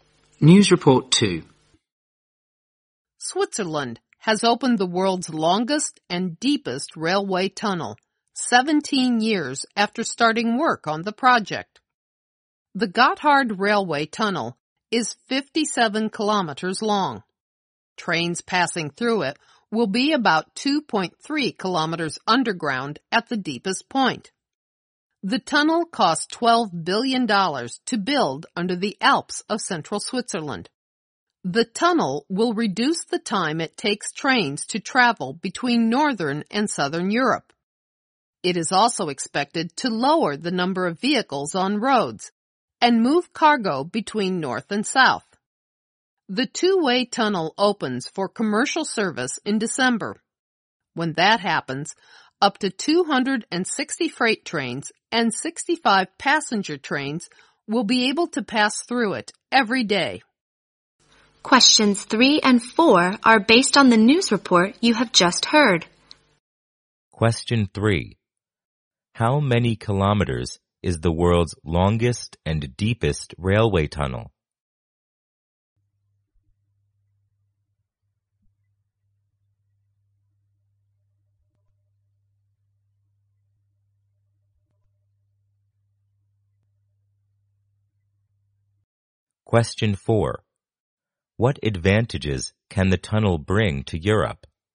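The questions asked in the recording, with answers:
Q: How many kilometers is the world's longest and deepest railway tunnel?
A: 57 kilometers.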